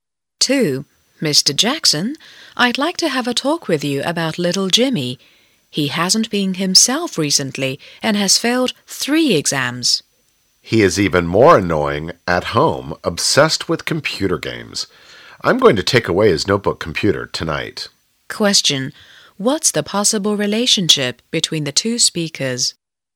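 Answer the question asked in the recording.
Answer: Teacher and parent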